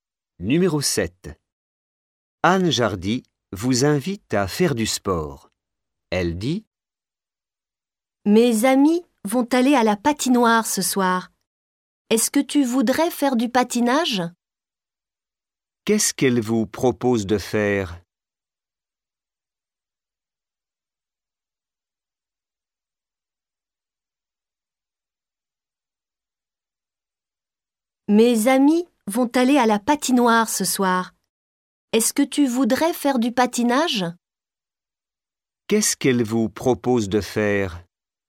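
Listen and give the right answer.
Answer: Du patinage (à la patinoire)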